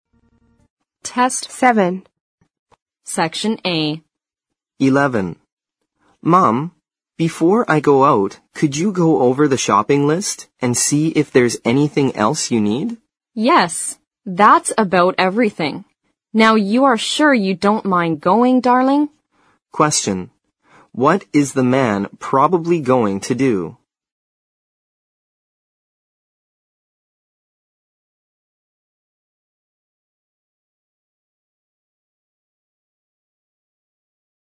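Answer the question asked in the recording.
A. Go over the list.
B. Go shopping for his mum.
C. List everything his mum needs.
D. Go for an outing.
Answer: B. Go shopping for his mum.

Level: 四级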